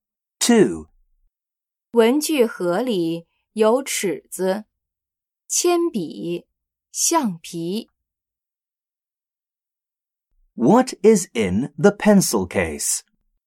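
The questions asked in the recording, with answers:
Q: What is in the pencil case?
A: A ruler, a pencil and an eraser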